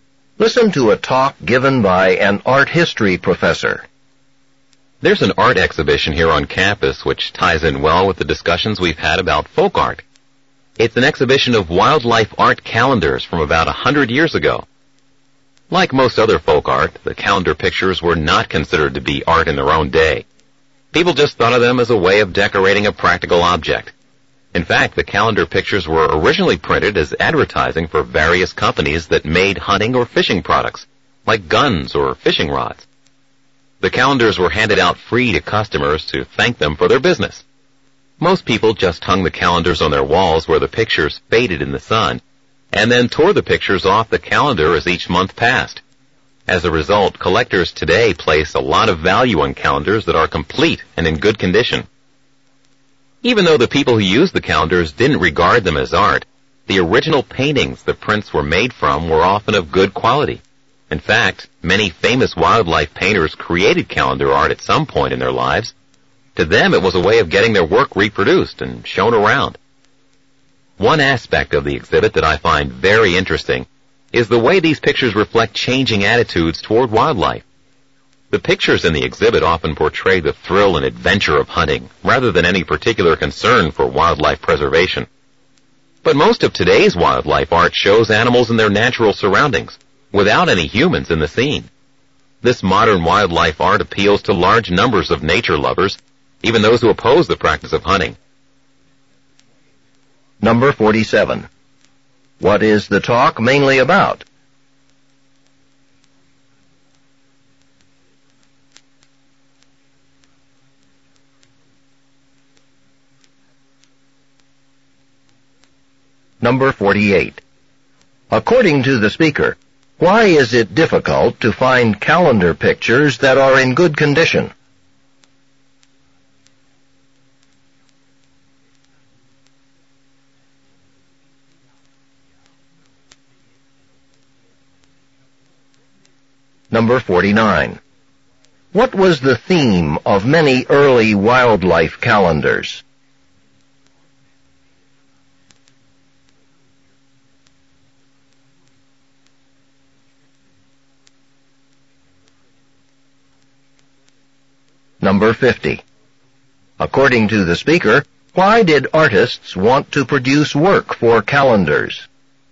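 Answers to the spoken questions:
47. An exhibition of old wildlife art calendars
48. People hung them where they faded in the sun and tore pictures off each month
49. The thrill and adventure of hunting
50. To get their work reproduced and shown around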